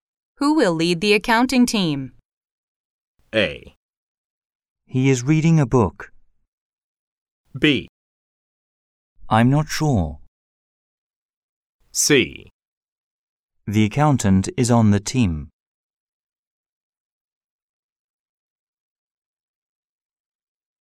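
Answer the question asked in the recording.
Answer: B: I'm not sure.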